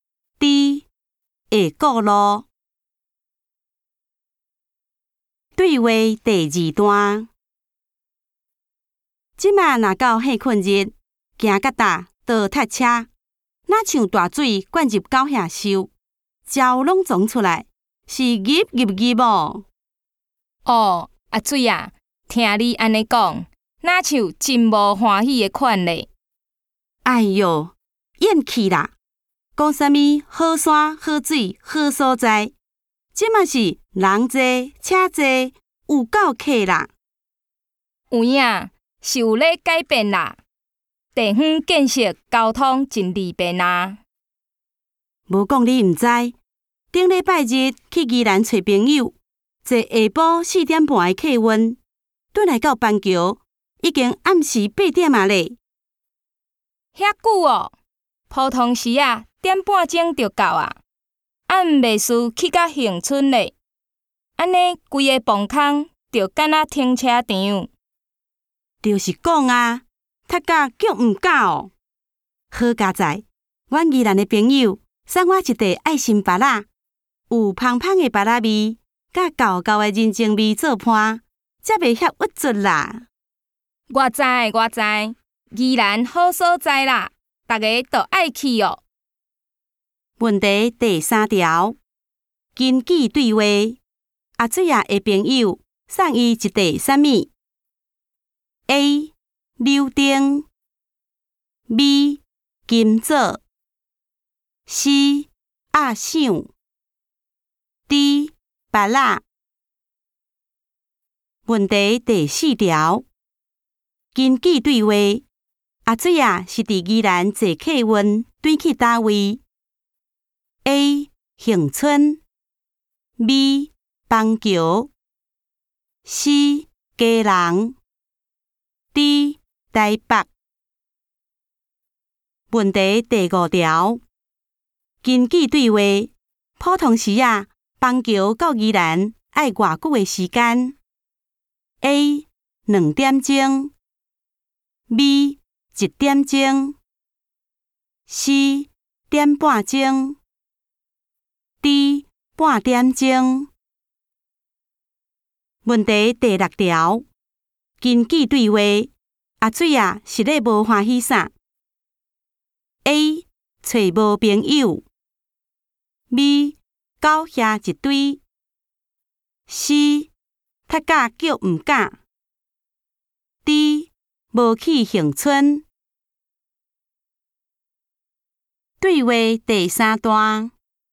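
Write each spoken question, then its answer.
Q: 根据对话,阿水啊的朋友送伊一袋啥物 ?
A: D: 芭乐

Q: 根据对话,阿水啊是伫宜兰坐客运转去哪位 ?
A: B: 邦球

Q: 根据对话,普通时啊,邦球到宜兰要多久的时间?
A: C: 点半钟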